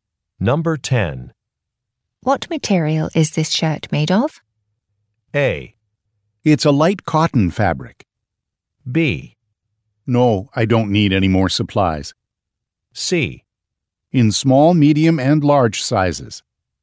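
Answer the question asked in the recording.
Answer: A: It's a light cotton fabric.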